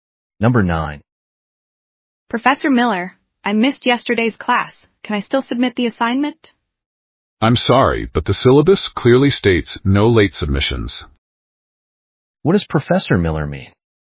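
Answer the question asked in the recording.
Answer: The assignment can't be submitted late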